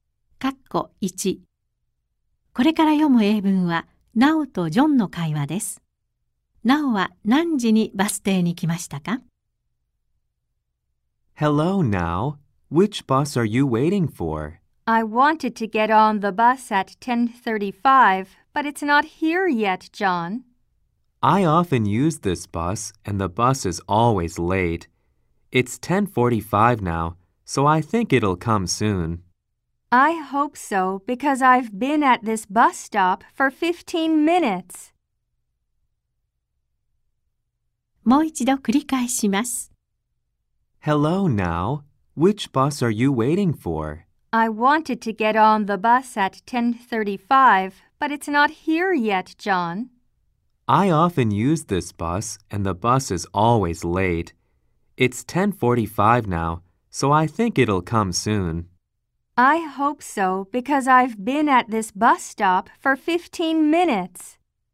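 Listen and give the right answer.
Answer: 10時30分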